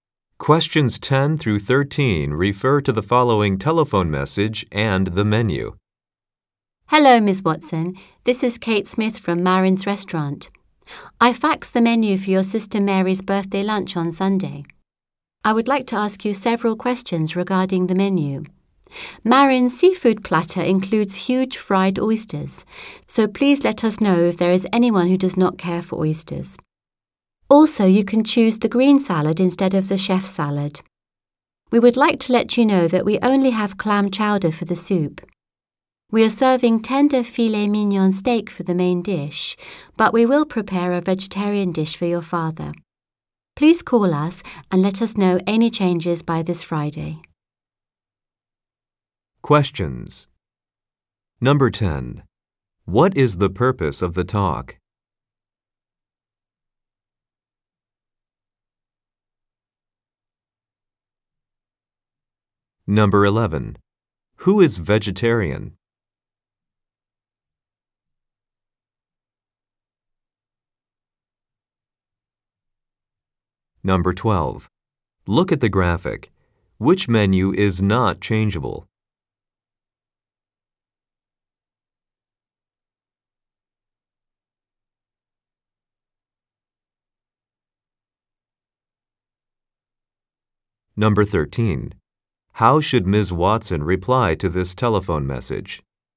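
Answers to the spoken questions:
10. To ask questions about the menu for Mary's birthday lunch
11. Ms. Watson's father
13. By calling the restaurant by Friday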